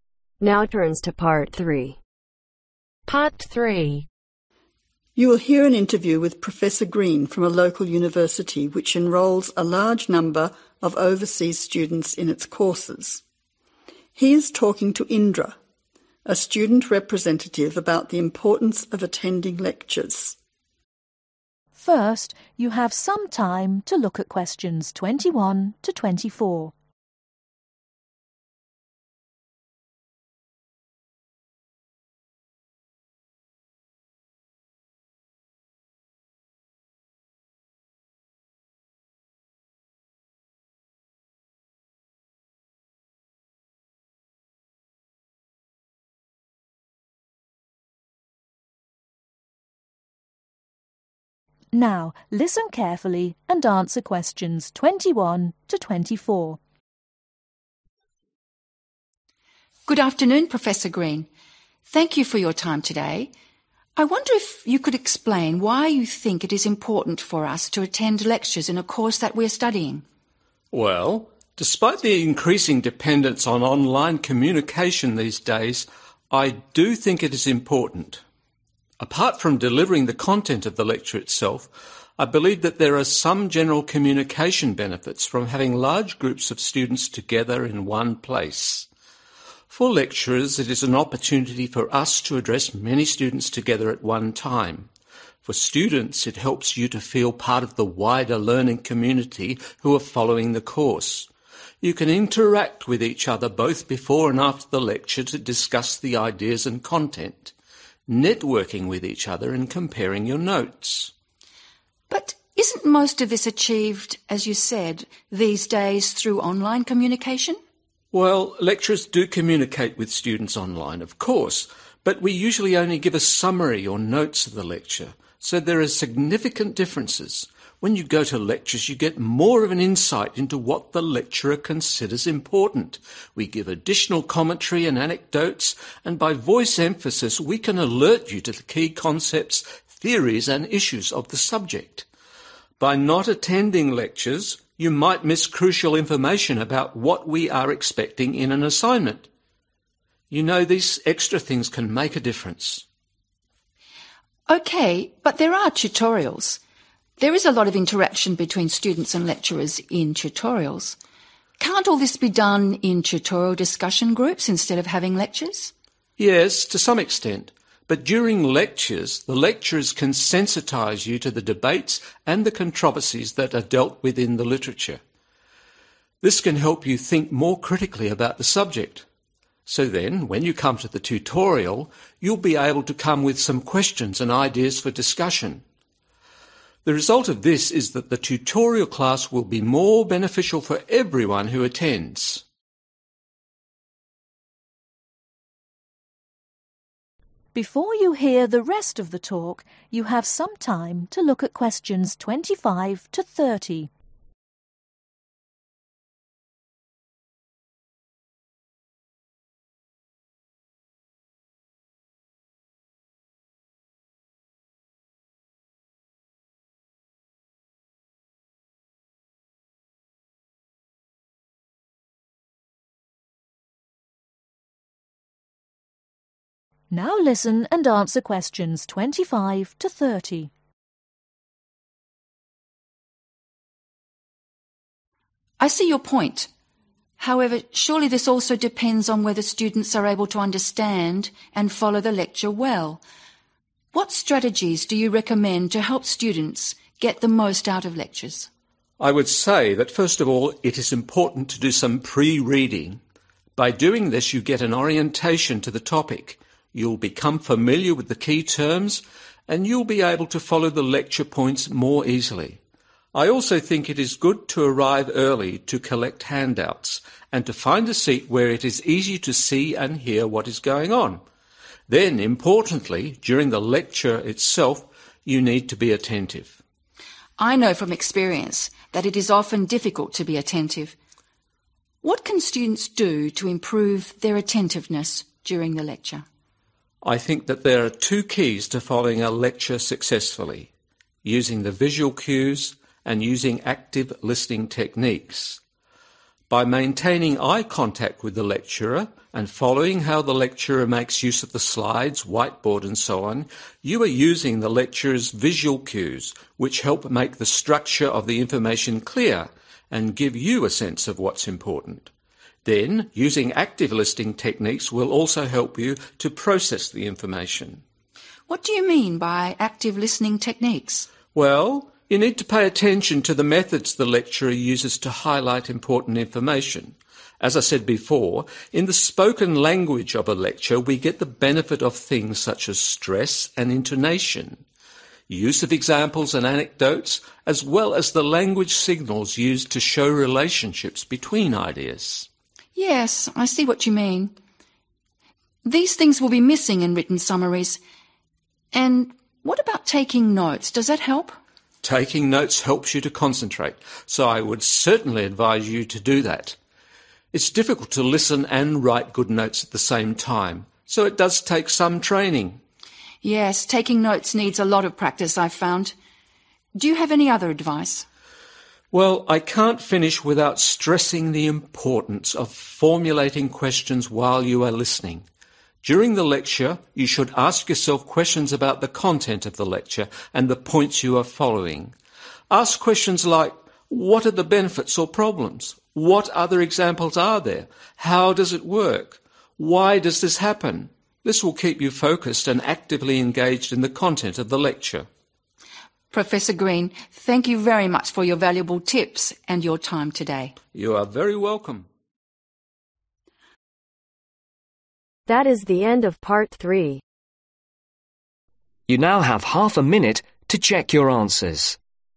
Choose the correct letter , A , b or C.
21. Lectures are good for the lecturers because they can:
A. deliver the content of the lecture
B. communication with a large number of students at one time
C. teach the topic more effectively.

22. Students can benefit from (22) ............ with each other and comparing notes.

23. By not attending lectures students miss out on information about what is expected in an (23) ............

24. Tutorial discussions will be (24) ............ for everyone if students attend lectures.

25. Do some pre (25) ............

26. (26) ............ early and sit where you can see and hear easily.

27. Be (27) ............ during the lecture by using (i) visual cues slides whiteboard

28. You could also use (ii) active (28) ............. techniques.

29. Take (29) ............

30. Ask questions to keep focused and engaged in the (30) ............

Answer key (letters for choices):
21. B
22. networking
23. assignment
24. more beneficial
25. reading
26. arrive
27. attentive
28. listening
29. notes
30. content